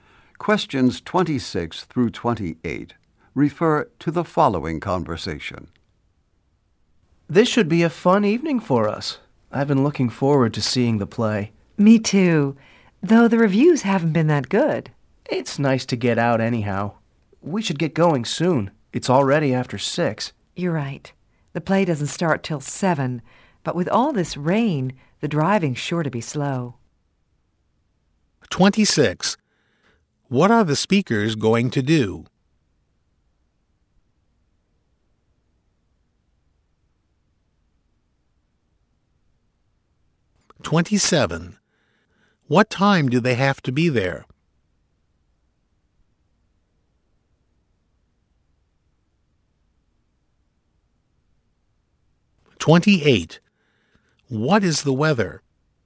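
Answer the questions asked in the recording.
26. See a play
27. 7:00
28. Rainy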